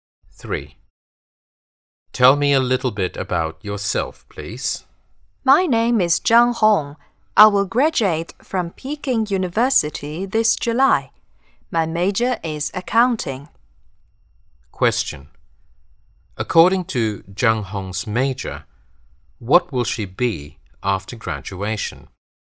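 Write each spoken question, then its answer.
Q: According to Zhang Hong's major, what will she be after graduation?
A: An accountant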